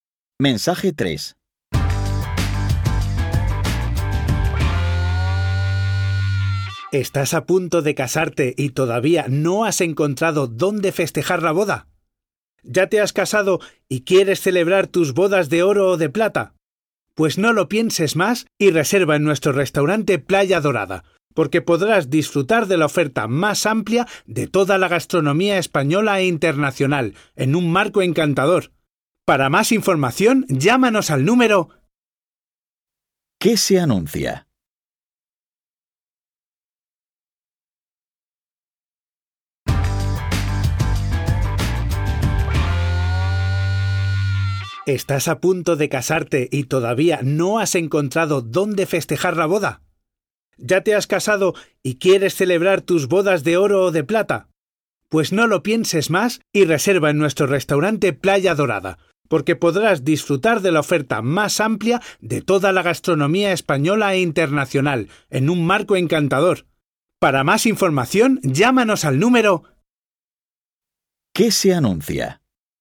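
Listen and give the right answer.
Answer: Un restaurante para celebrar bodas.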